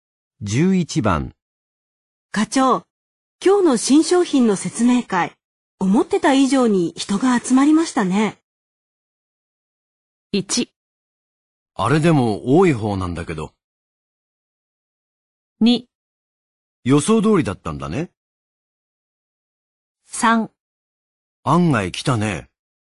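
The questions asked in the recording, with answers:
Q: 課長、今日の新商品の説明会、思ってた以上に人が集まりましたね。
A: 3: 案外来たね。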